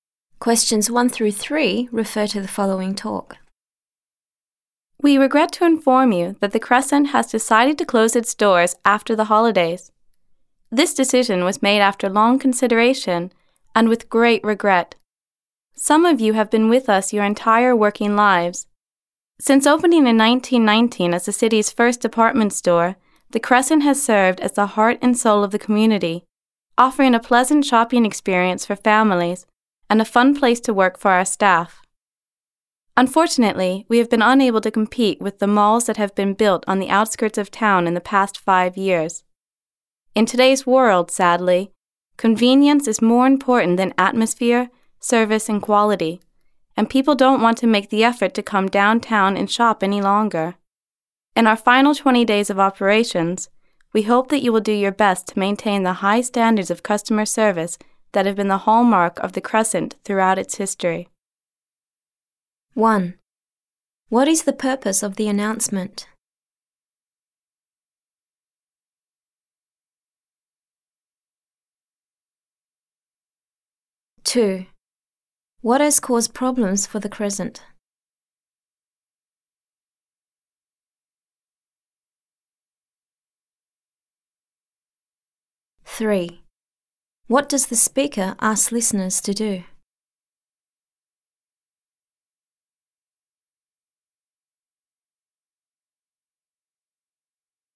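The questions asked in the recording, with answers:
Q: What is the purpose of the announcement?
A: To announce that the Crescent store is closing after the holidays

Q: What has caused problems for the Crescent?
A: Competition from new malls on the outskirts of town

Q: What does the speaker ask listeners to do?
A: Keep up high standards of customer service in the final 20 days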